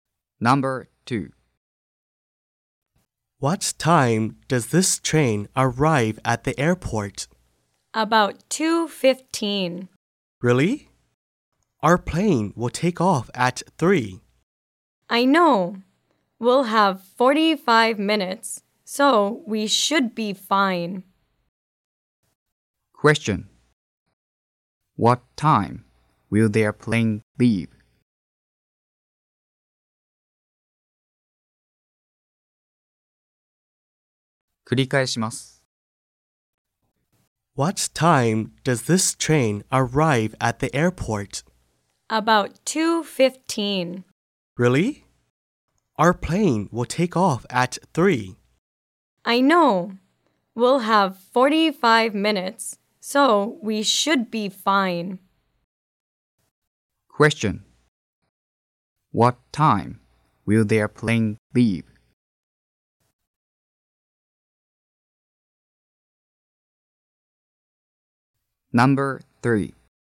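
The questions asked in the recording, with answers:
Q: What time will their plane leave?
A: At 3.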